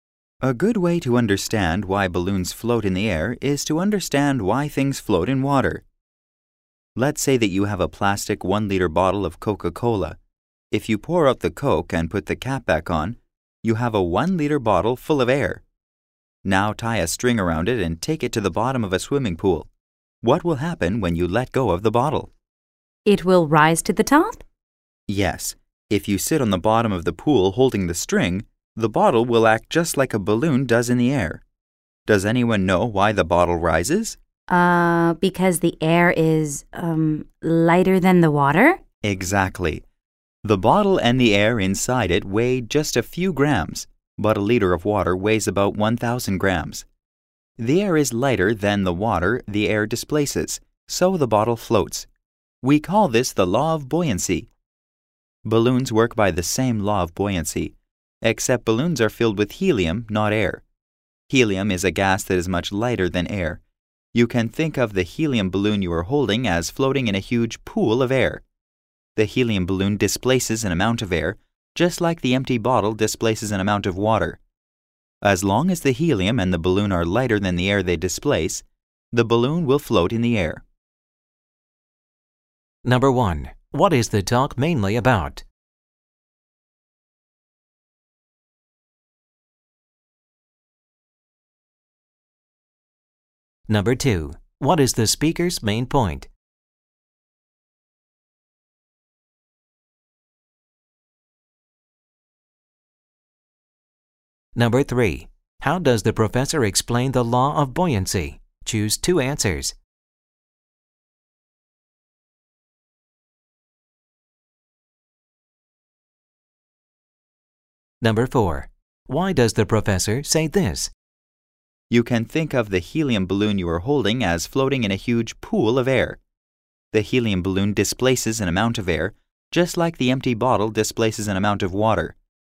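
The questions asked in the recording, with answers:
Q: What is the talk mainly about?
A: Why balloons float in the air (the law of buoyancy)

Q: What is the speaker's main point?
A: Balloons float because the helium and balloon are lighter than the air they displace

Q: Why does the professor say this?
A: To compare the helium balloon in air to the empty bottle floating in water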